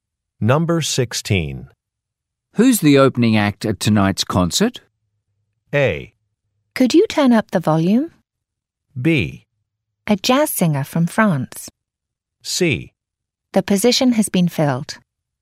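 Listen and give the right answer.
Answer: B: A jazz singer from France.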